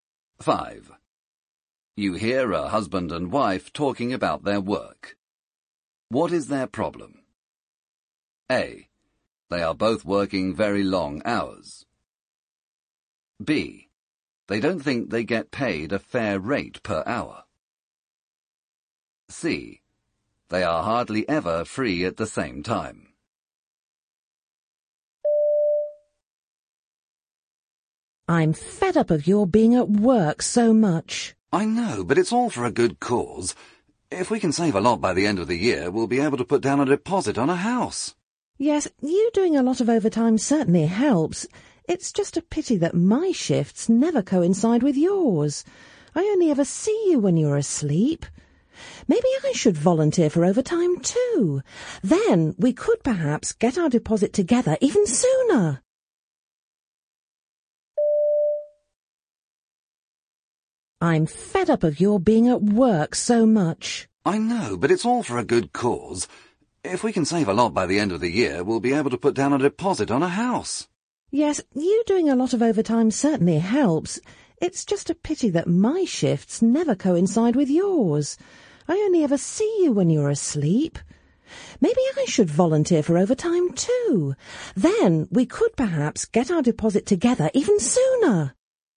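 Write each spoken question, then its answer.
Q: What is their problem?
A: C: They are hardly ever free at the same time.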